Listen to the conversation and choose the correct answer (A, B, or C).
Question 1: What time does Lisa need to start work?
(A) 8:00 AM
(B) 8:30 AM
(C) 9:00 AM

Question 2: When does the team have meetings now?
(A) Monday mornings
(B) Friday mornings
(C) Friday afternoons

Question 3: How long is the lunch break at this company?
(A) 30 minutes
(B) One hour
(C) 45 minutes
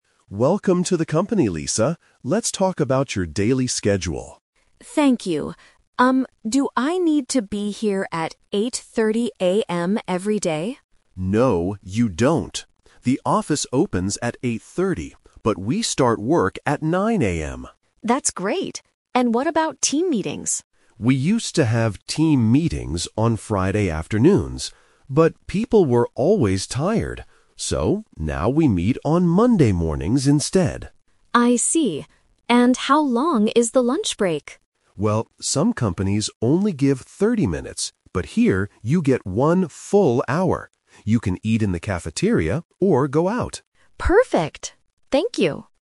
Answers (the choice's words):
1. 9:00 AM
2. Monday mornings
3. One hour

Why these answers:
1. Mr. Davis clearly says "we start work at 9:00 AM." Option B (8:30 AM) is a trap because Lisa asks about it and the office opens at that time, but it is not the time work starts. Option A is not mentioned.
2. Mr. Davis says "now we meet on Monday mornings instead." Option C (Friday afternoons) is a trap because it is the old schedule (they used to have meetings then). Option B is not mentioned.
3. Mr. Davis says "here you get one full hour." Option A (30 minutes) is a trap because he mentions that some other companies give 30 minutes, not this company. Option C is not mentioned.

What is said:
Mr. Davis: Welcome to the company, Lisa. Let's talk about your daily schedule.
Lisa: Thank you. Um, do I need to be here at 8:30 AM every day?
Davis: No, you don't. The office opens at 8:30, but we start work at 9:00 AM.
Lisa: That's great. And what about team meetings?
Davis: We used to have team meetings on Friday afternoons. But people were always tired. So, now we meet on Monday mornings instead.
Lisa: I see. And how long is the lunch break?
Davis: Well, some companies only give 30 minutes, but here you get one full hour.